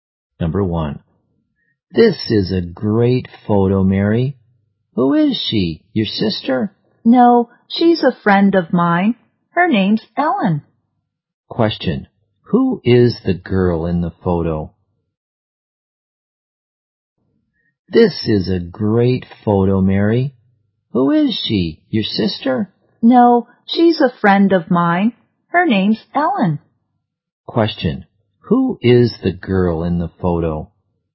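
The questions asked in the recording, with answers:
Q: Question,Who is the girl in the photo?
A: Mary's friend Ellen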